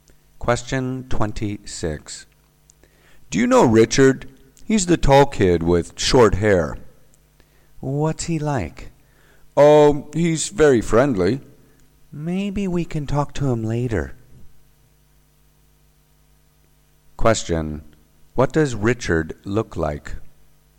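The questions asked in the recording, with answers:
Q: What does Richard look like?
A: He's tall with short hair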